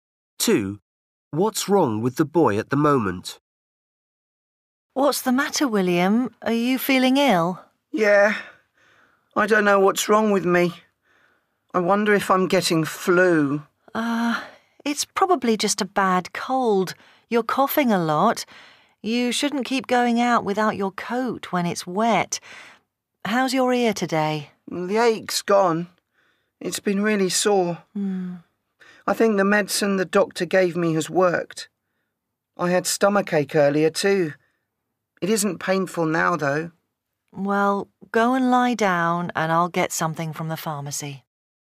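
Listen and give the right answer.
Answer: a cold / a cough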